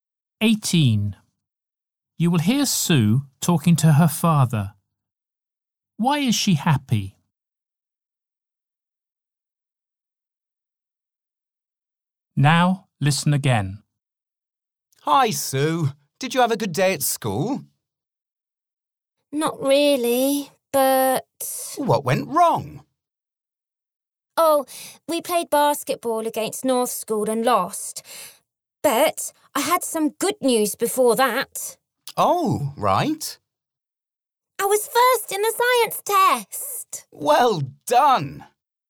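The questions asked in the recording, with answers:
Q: Why is she happy?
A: She was first in the science test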